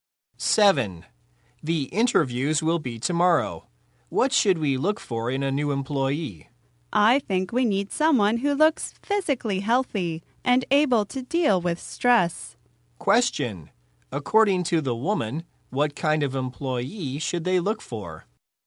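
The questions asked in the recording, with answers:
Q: According to the woman, what kind of employee should they look for?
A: Someone physically healthy and able to deal with stress.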